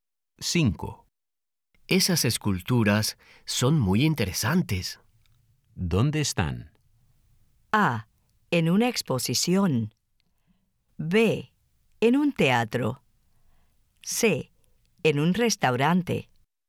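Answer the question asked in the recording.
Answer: A: En una exposición.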